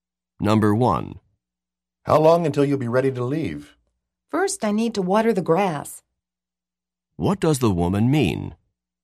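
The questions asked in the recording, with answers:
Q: What does the woman mean?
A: She has to water the grass before she can leave.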